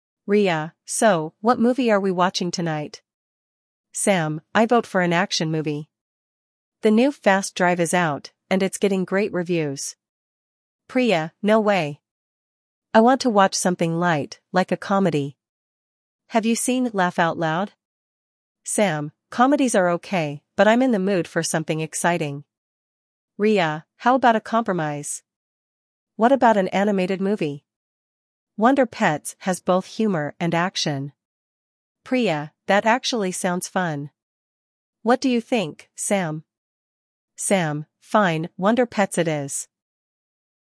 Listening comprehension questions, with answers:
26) What kind of movie does Sam suggest initially?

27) What does Priya want to watch?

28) Why does Riya suggest an animated movie?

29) What movie do they finally agree on?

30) How does Sam react to the final choice?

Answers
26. Action movie
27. Comedy
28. It includes humor and action
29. "Wonder Pets"
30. He agrees reluctantly

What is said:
Riya: So, what movie are we watching tonight?
Sam: I vote for an action movie. The new "Fast Drive" is out, and it's getting great reviews.
Priya: No way! I want to watch something light—like a comedy. Have you seen "Laugh Out Loud"?
Sam: Comedies are okay, but I'm in the mood for something exciting.
Riya: How about a compromise? What about an animated movie? "Wonder Pets" has both humor and action.
Priya: That actually sounds fun. What do you think, Sam?
Sam: Fine, "Wonder Pets" it is.